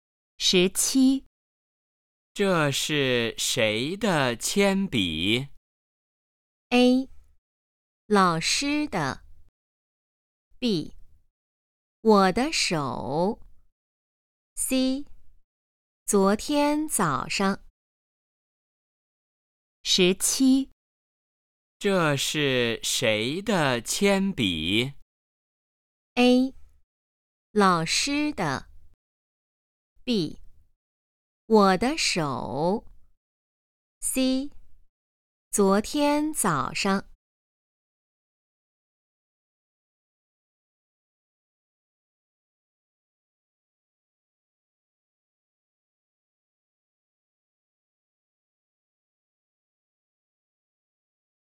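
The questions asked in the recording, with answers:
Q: 这是谁的铅笔?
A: A: 老师的。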